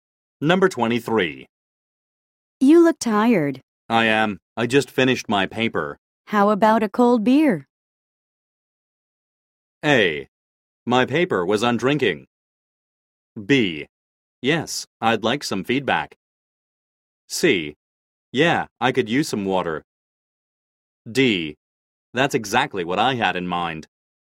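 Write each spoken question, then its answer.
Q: How about a cold beer?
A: D: That's exactly what I had in mind.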